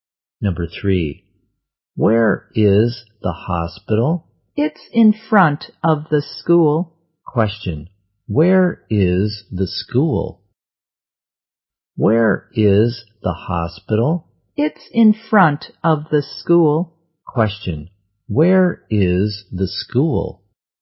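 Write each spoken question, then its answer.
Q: where is the school?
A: Behind the hospital.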